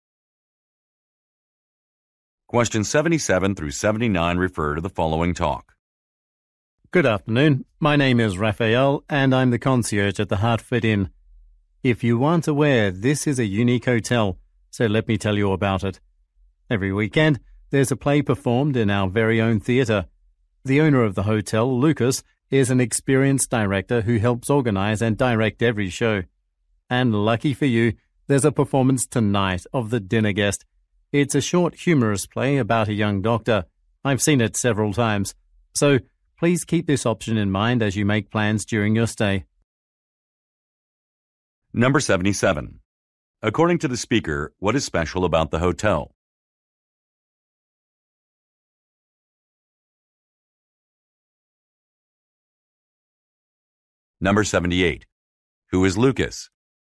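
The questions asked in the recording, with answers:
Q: According to the speaker, what is special about the hotel?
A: It has its own theatre with plays every weekend

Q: Who is Lucas?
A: The hotel owner, an experienced director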